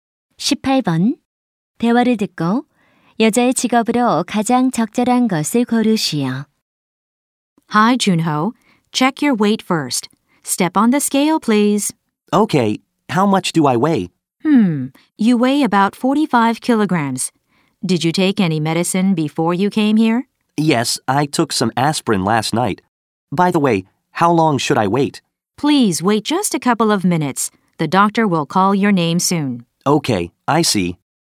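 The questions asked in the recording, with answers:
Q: 대화를 듣고 여자의 직업으로 가장 적절한 것을 고르시오.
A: 간호사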